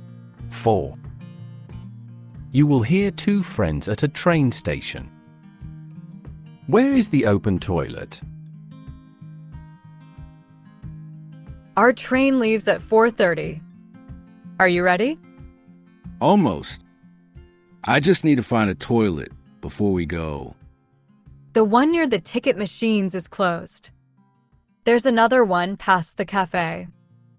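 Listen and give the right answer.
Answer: Past the cafe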